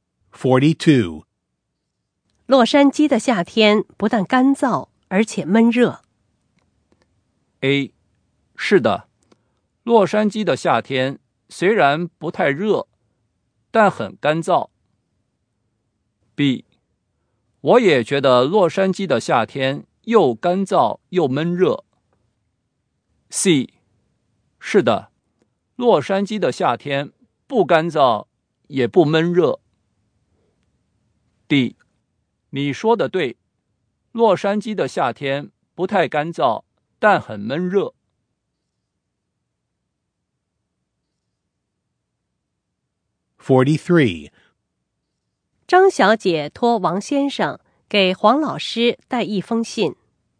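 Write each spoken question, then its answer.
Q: 洛杉矶的夏天不但干燥,而且闷热。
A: B: 我也觉得洛杉矶的夏天又干燥又闷热。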